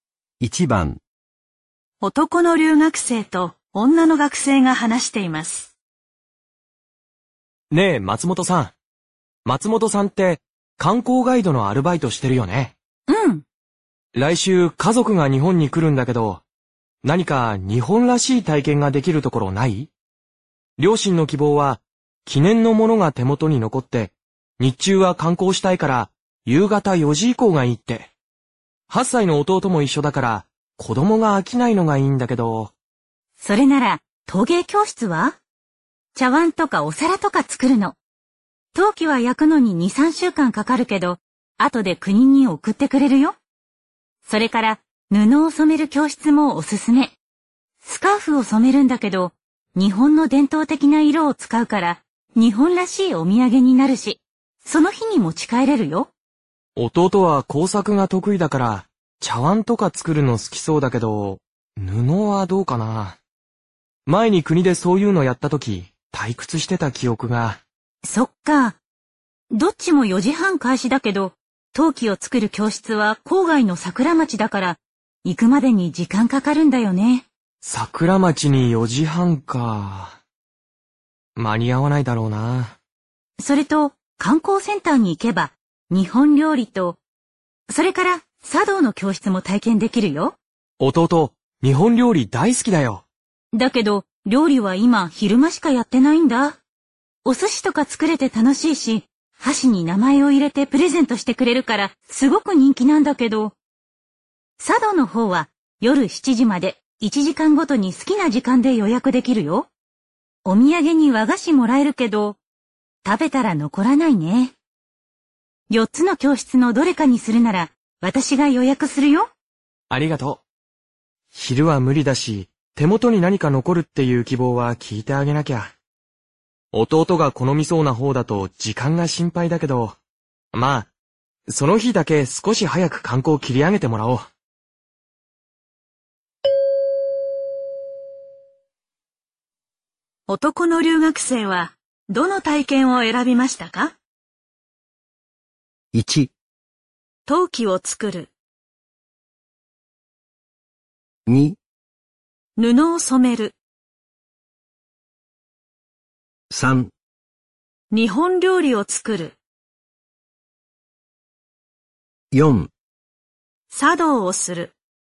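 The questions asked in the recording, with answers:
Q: 男の留学生はどの体験を選びましたか?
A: 1: 陶器を作る。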